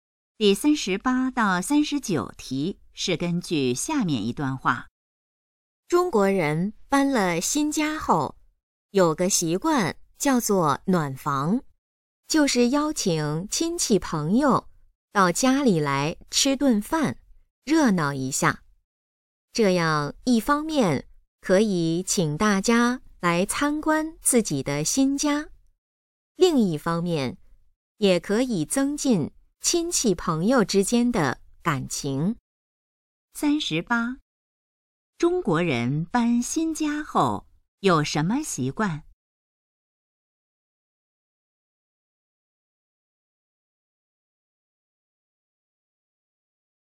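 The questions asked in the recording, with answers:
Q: 中国人搬新家后有什么习惯?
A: 暖房,请亲戚朋友来家里吃饭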